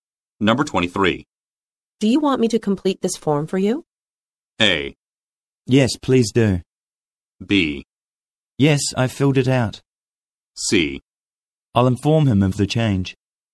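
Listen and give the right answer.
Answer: A: Yes, please do.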